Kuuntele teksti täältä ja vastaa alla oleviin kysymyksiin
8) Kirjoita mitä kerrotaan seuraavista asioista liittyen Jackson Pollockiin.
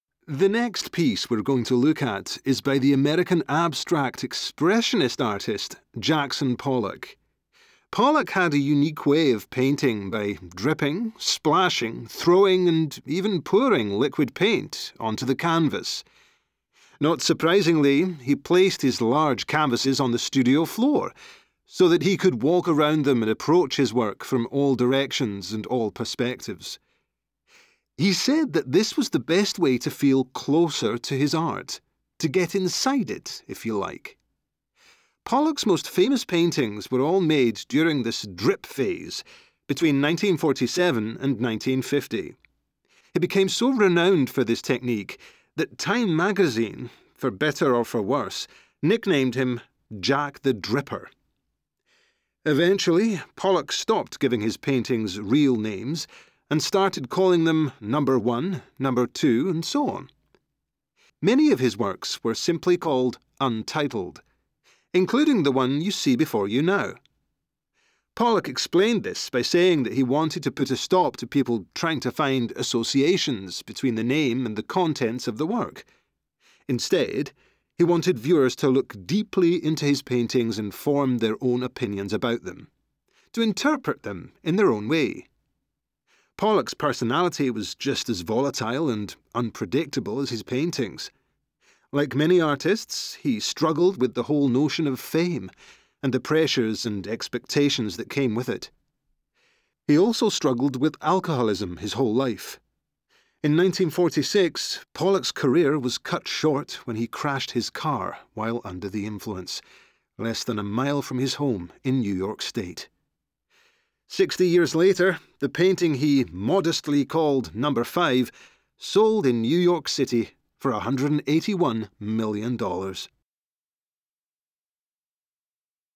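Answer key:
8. Maalaustyyli: maali tiputettiin, roiskittiin, heitettiin ja kaadettiin kankaalle, joka oli lattialla, jotta hän pystyi kiertämään sitä joka suunnasta. Nimeäminen: teokset numeroitiin (Number 1, Number 2) tai nimettiin Untitled, jotta katsojat eivät etsisi yhteyksiä nimen ja sisällön välillä. Elämä: häntä kutsuttiin nimellä Jack the Dripper, hänellä oli ailahteleva luonne, hän kamppaili maineen paineiden kanssa, hän kärsi koko ikänsä alkoholismista ja kuoli ajettuaan kolarin humalassa lähellä kotiaan; Number 5 myytiin myöhemmin 181 miljoonalla dollarilla.

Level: Course 3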